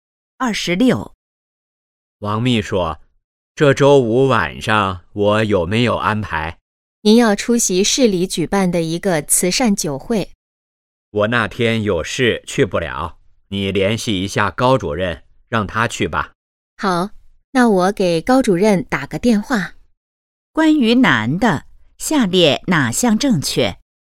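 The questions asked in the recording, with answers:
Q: 关于男的,下列哪项正确?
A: 周五去不了慈善酒会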